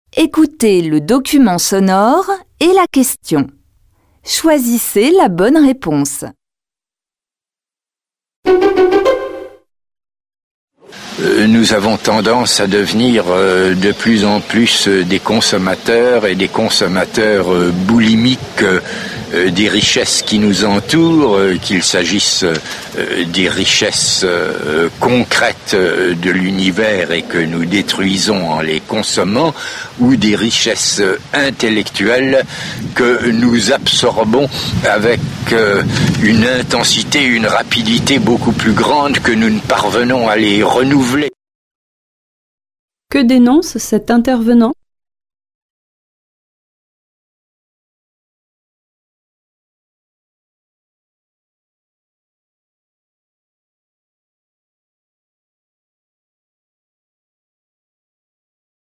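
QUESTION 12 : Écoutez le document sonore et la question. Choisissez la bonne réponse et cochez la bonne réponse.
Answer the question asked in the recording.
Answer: La surconsommation des richesses matérielles et intellectuelles, plus rapide que leur renouvellement.

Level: Tăng dần từ trình độ A1 đến C1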